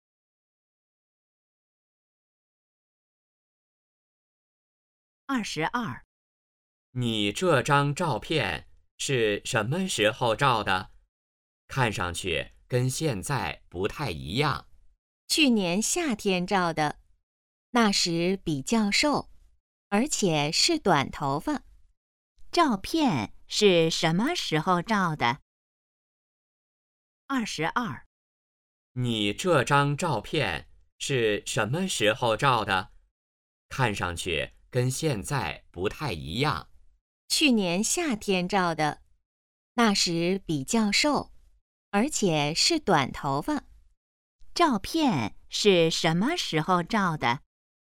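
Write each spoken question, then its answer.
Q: 照片是什么时候照的?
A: 去年夏天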